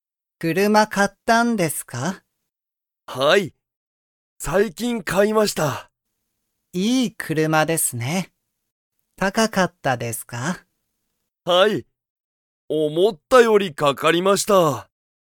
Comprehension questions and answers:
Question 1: その車(くるま)は高(たか)かったですか?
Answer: はい

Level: Level 1